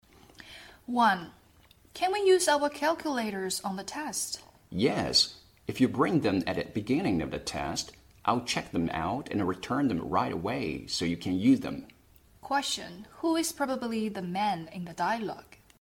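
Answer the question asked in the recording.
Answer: A teacher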